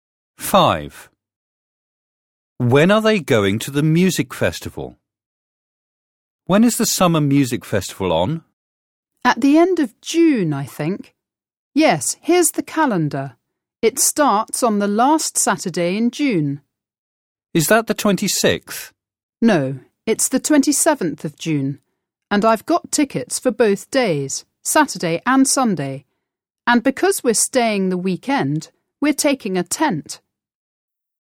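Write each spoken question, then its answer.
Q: When are they going to the music festival?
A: On the 27th and 28th of June, the last weekend in June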